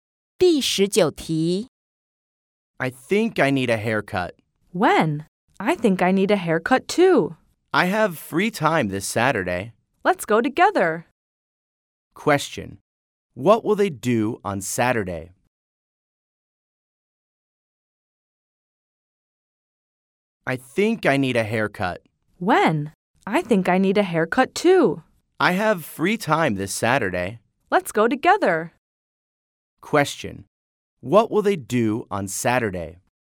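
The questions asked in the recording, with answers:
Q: What will they do on Saturday?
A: Get a haircut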